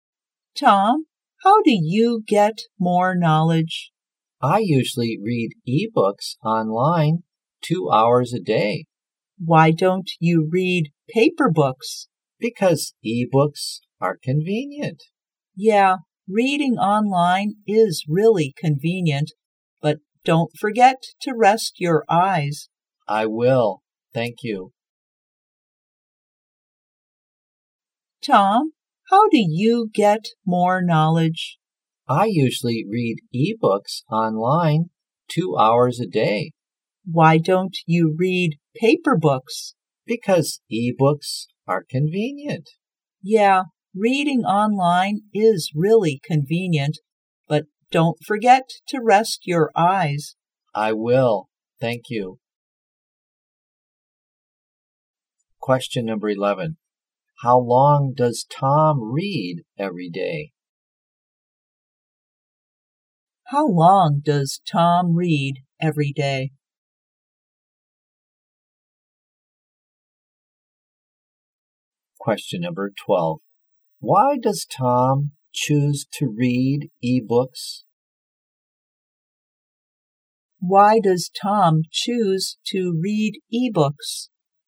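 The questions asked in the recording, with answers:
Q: How long does Tom read every day?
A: 2 hours

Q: Why does Tom choose to read ebooks?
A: Because ebooks are convenient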